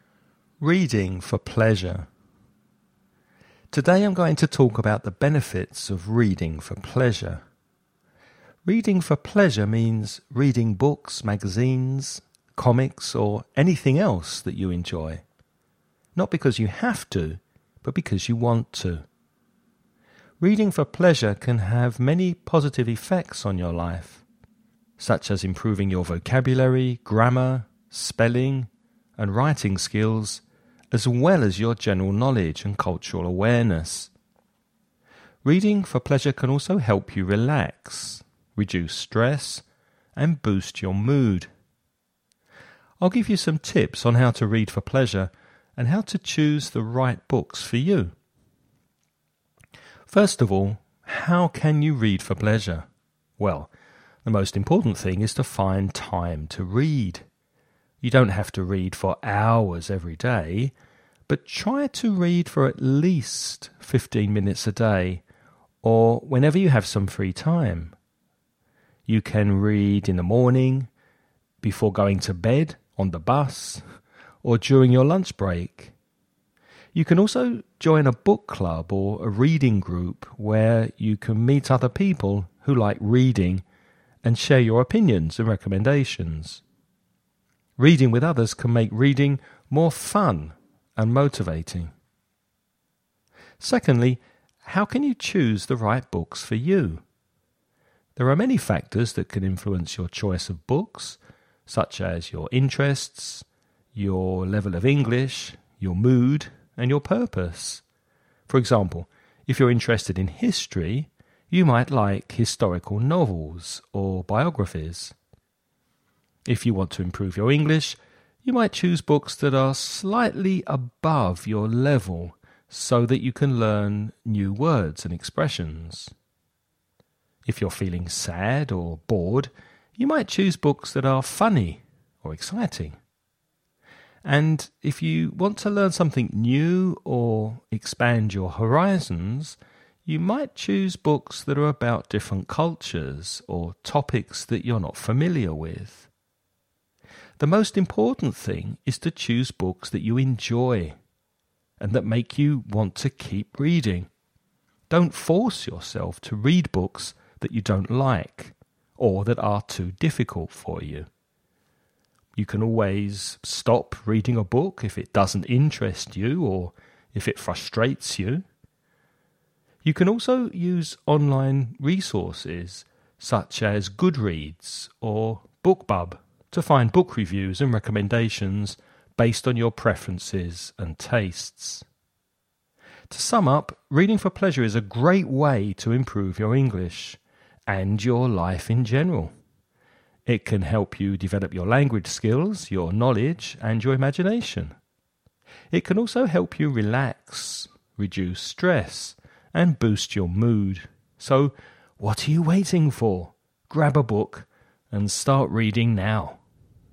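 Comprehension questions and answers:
Now listen and answer the questions.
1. What are some of the benefits of reading for pleasure mentioned in the talk?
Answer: It improves vocabulary, grammar, spelling and writing, general knowledge and cultural awareness; it helps you relax, reduce stress and boost your mood.

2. How much time should you read every day according to the speaker?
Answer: At least 15 minutes a day.

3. What are some of the factors that can influence your choice of books?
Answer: Your interests, your level of English, your mood and your purpose.

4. What should you do if you don't like or understand a book?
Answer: Stop reading it; don't force yourself.

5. What are some of the online resources that can help you find books?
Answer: Goodreads and BookBub.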